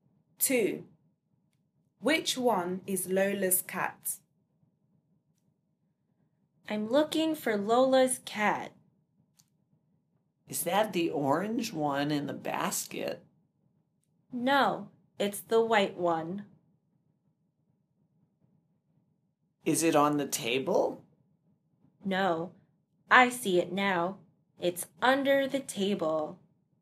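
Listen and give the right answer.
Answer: The white one under the table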